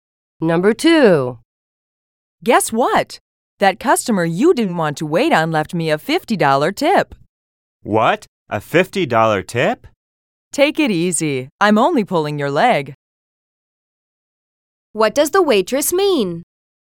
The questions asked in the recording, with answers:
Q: What does the waitress mean?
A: She was joking about the $50 tip.